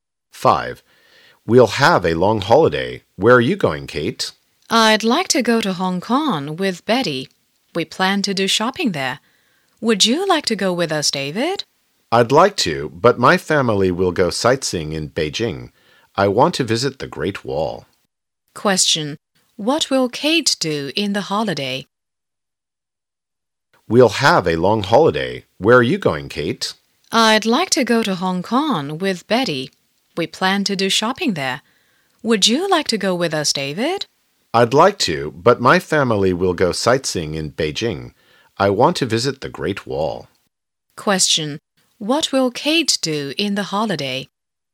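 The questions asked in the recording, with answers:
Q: What will Kate do in the holiday?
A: Go shopping in Hong Kong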